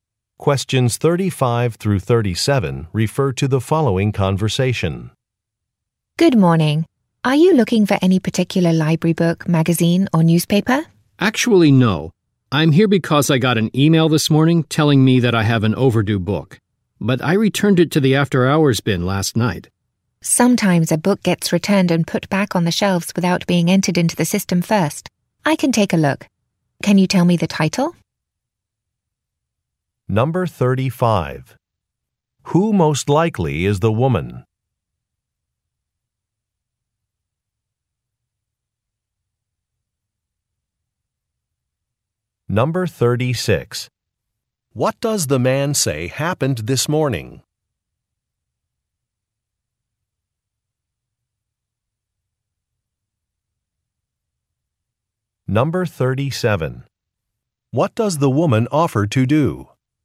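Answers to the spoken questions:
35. A librarian
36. He got an email saying he has an overdue book
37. Look for the book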